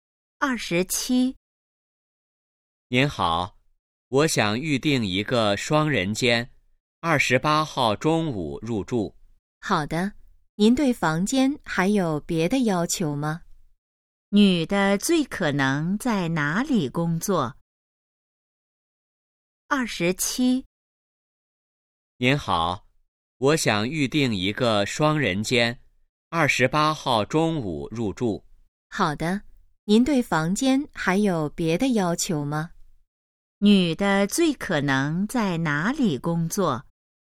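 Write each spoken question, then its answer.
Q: 女的最可能在哪里工作?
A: 宾馆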